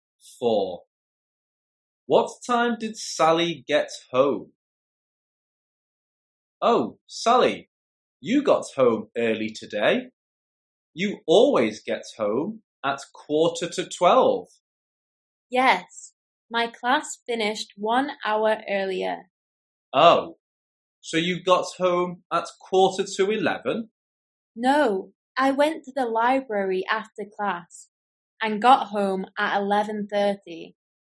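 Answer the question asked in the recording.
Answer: 11:30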